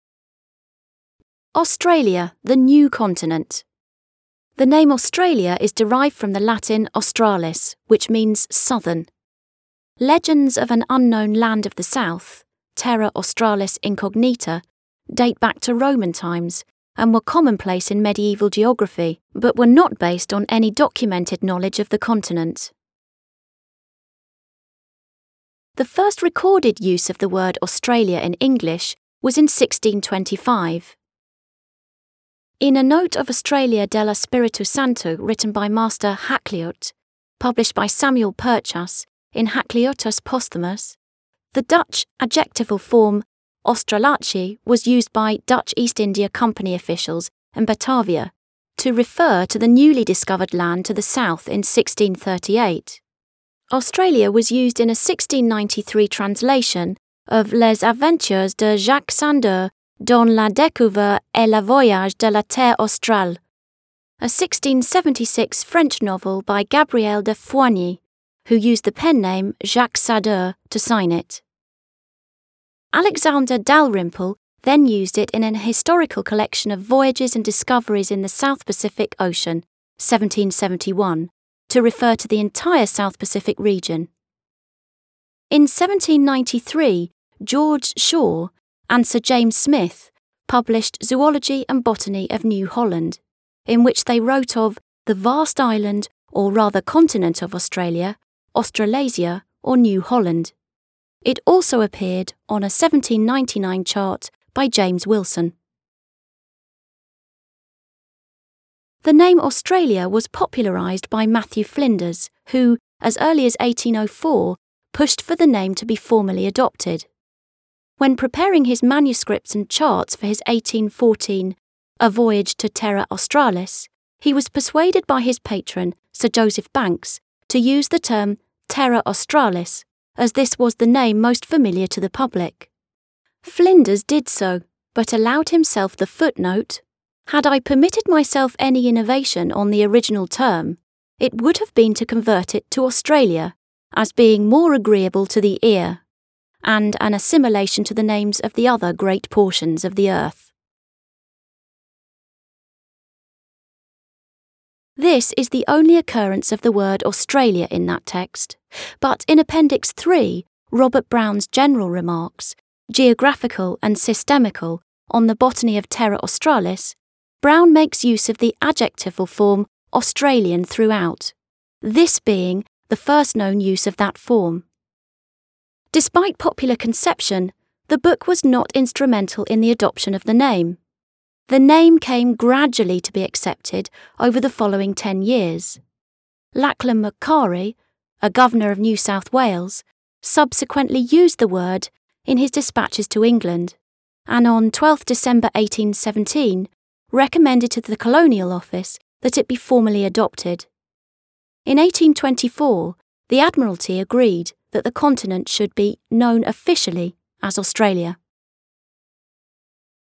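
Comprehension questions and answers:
According to the text, are the following questions, true or false?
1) Australia appeared in Gabriel de Foigny's novel.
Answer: Verdadero

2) Matthew Flinders used the word Australia to refer to Terra Australis.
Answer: Falso

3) Australia was accepted as an official name in 1824.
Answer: Verdadero

Answer the following questions:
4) According to the text, did the word Australia first appear in a Roman document?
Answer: No, it first appeared in English in 1625.

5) According to the text, was the name Australia accepted from Flinders's A Voyage to Terra Australis on?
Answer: No, it was gradually accepted over the following ten years.

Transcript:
Australia, the new continent1
The name Australia is derived from the Latin australis, which means "southern". Legends of an "unknown land of the south" (terra australis incognita) date back to Roman times and were commonplace in medieval geography but were not based on any documented knowledge of the continent.
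The first recorded use of the word Australia in English was in 1625, in "A note of Australia del Espíritu Santo, written by Master Hakluyt", published by Samuel Purchas in Hakluytus Posthumus. The Dutch adjectival form Australische was used by Dutch East India Company officials in Batavia to refer to the newly discovered land to the south in 1638. Australia was used in a 1693 translation of Les Aventures de Jacques Sadeur dans la Découverte et le Voyage de la Terre Australe, a 1676 French novel by Gabriel de Foigny, who used the pen-name Jacques Sadeur to sign it. Alexander Dalrymple then used it in An Historical Collection of Voyages and Discoveries in the South Pacific Ocean (1771) to refer to the entire South Pacific region. In 1793, George Shaw and Sir James Smith published Zoology and Botany of New Holland, in which they wrote of "the vast island, or rather continent, of Australia, Australasia or New Holland". 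It also appeared on a 1799 chart by James Wilson.
The name Australia was popularised by Matthew Flinders, who, as early as 1804, pushed for the name to be formally adopted. When preparing his manuscript and charts for his 1814 A Voyage to Terra Australis, he was persuaded by his patron Sir Joseph Banks to use the term Terra Australis as this was the name most familiar to the public. Flinders did so, but allowed himself the footnote:
"Had I permitted myself any innovation on the original term, it would have been to convert it to Australia; as being more agreeable to the ear, and an assimilation to the names of the other great portions of the earth."
This is the only occurrence of the word Australia in that text; but in Appendix III, Robert Brown's General remarks, geographical and systematical, on the botany of Terra Australis, Brown makes use of the adjectival form Australian throughout, this being the first known use of that form. 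Despite popular conception, the book was not instrumental in the adoption of the name: the name came gradually to be accepted over the following ten years. Lachlan Macquarie, a Governor of New South Wales, subsequently used the word in his dispatches to England, and on 12 December 1817 recommended to the Colonial Office that it be formally adopted. In 1824, the Admiralty agreed that the continent should be known officially as Australia.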